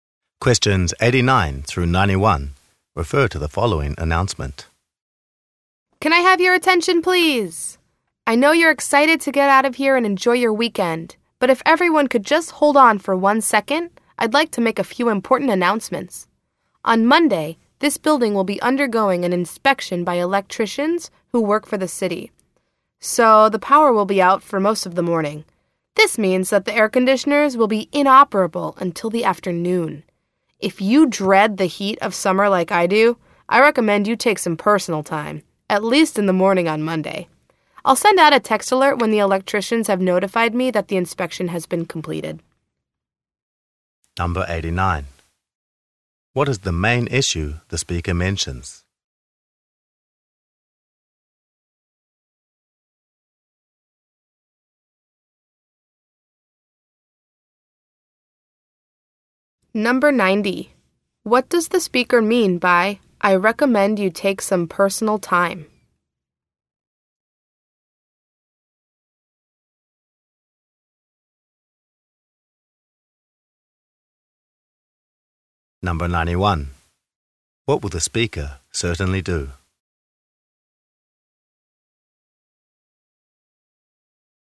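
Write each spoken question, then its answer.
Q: What is the main issue the speaker mentions?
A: The power will be out Monday morning for an electrical inspection

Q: What does the speaker mean by, "I recommend you take some personal time"?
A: Listeners should take Monday morning off to avoid the heat

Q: What will the speaker certainly do?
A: Send a text alert when the inspection is completed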